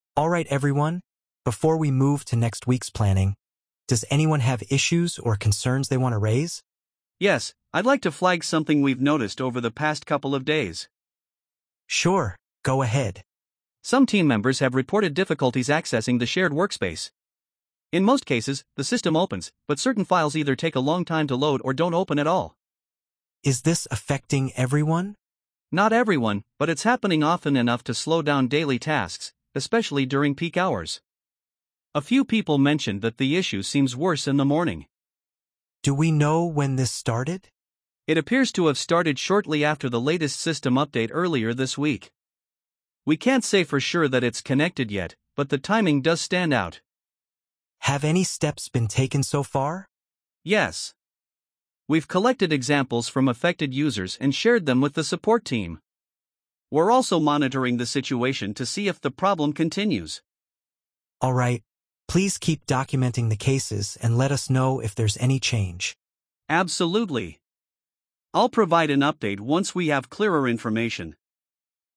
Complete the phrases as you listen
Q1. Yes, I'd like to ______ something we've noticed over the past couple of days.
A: flag

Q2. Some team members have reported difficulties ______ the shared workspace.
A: accessing

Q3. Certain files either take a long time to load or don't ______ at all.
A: open

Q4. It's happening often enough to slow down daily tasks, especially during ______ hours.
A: peak

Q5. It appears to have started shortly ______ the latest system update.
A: after

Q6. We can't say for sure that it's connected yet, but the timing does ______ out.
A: stand

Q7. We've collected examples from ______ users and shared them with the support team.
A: affected

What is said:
"Alright everyone, before we move to next week's planning, does anyone have issues or concerns they want to raise?"
"Yes, I'd like to flag something we've noticed over the past couple of days."
"Sure, go ahead."
"Some team members have reported difficulties accessing the shared workspace. In most cases, the system opens, but certain files either take a long time to load or don't open at all."
"Is this affecting everyone?"
"Not everyone, but it's happening often enough to slow down daily tasks, especially during peak hours. A few people mentioned that the issue seems worse in the morning."
"Do we know when this started?"
"It appears to have started shortly after the latest system update earlier this week. We can't say for sure that it's connected yet, but the timing does stand out."
"Have any steps been taken so far?"
"Yes. We've collected examples from affected users and shared them with the support team. We're also monitoring the situation to see if the problem continues."
Please keep documenting the cases and let us know if there's any change."
"Absolutely. I'll provide an update once we have clearer information."